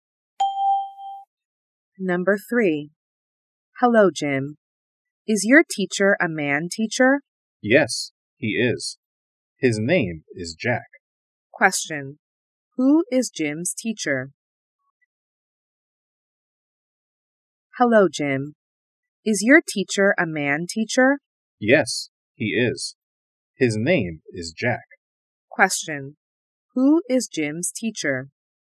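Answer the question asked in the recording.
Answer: Jack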